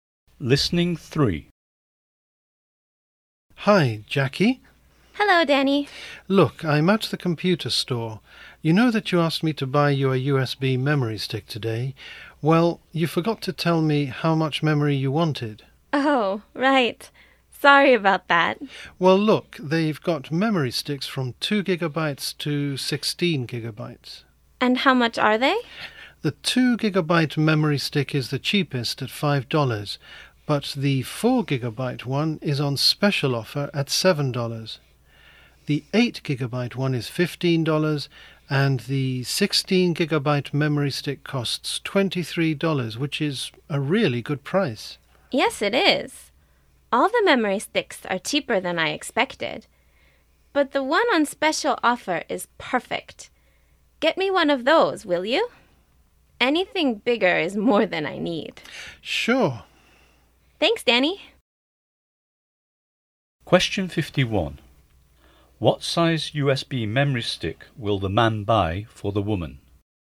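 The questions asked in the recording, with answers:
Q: What size USB memory stick will the man buy for the woman?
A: 4 gigabytes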